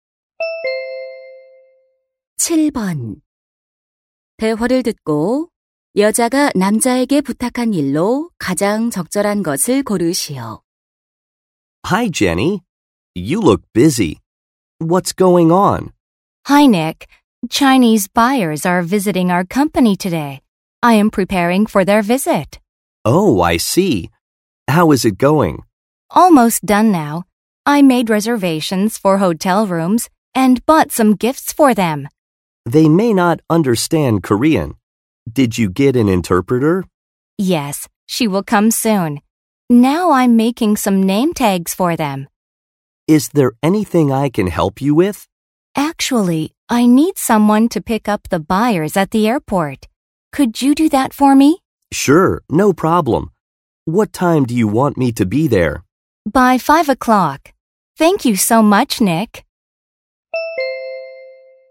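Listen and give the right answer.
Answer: 공항에 바이어 마중 나가기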